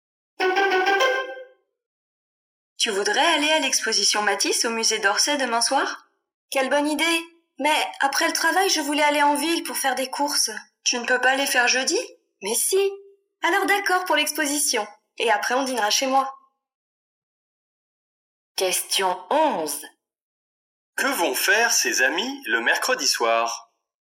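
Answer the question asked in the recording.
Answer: Aller à l'exposition Matisse puis dîner chez l'un d'eux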